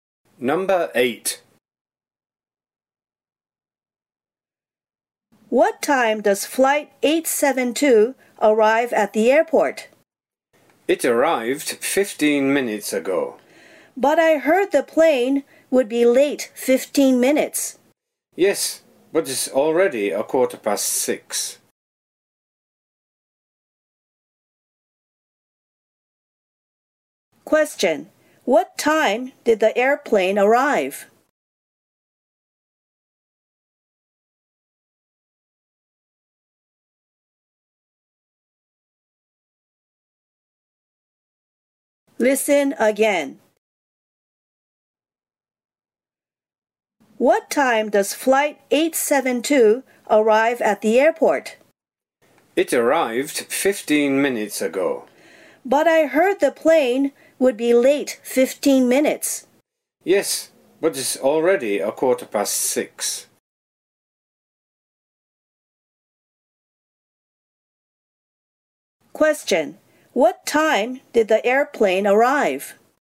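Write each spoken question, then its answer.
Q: Question. What time did the airplane arrive?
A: 6:00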